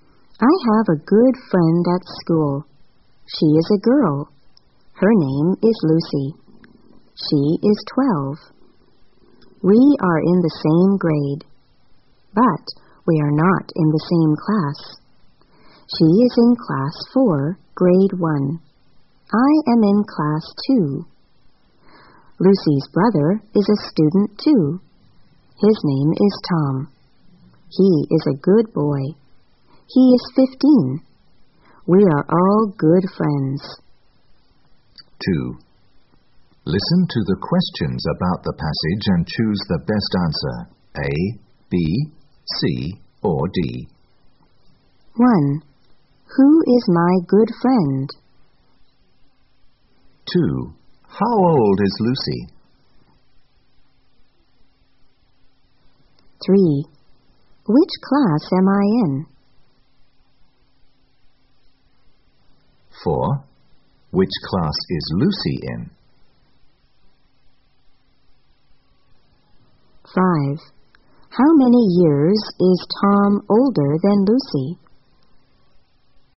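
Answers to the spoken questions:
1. Lucy
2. 12
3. Class 2, Grade 1
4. Class 4, Grade 1
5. 3 years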